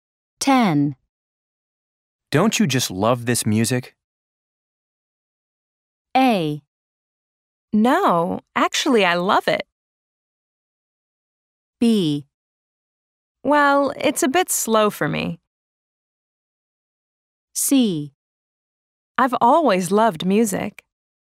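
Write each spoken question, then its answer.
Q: Don't you just love this music?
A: B: Well, it's a bit slow for me.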